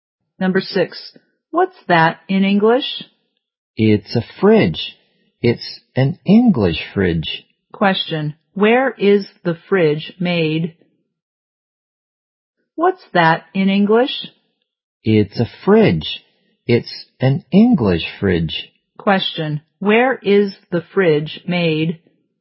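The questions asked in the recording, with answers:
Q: where is the fridge made?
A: In England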